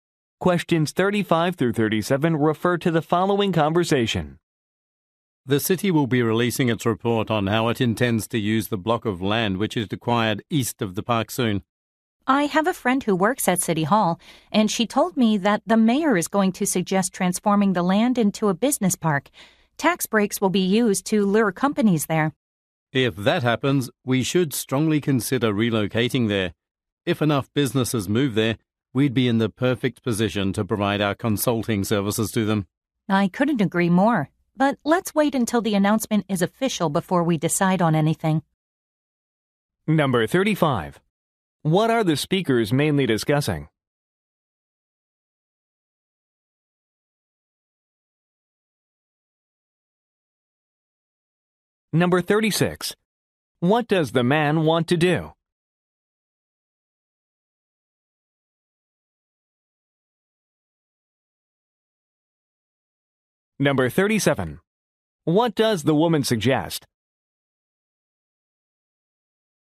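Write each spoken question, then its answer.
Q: What are the speakers mainly discussing?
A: The city's plan for land east of the park

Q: What does the man want to do?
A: Relocate the business to the business park

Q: What does the woman suggest?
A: Waiting for the official announcement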